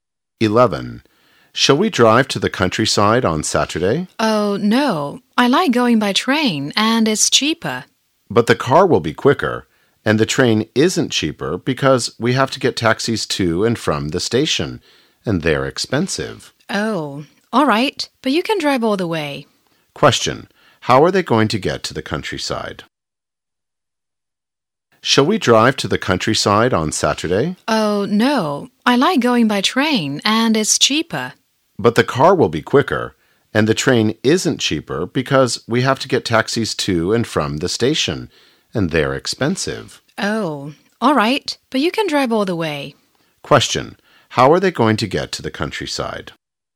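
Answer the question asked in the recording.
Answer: By car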